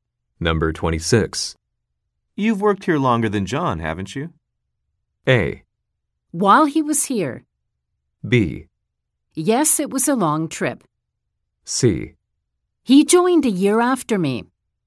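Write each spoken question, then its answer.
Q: You've worked here longer than John, haven't you?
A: C: He joined a year after me.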